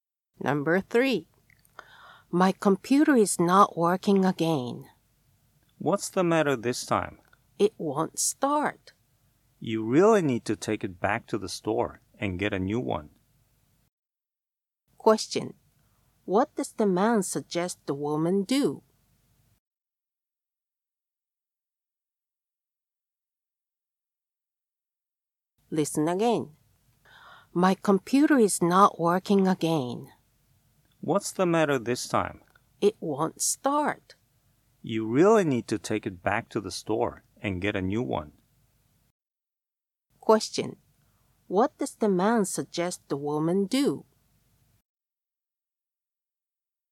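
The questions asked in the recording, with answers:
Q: What does the man suggest the woman do?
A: Take the computer back to the store and get a new one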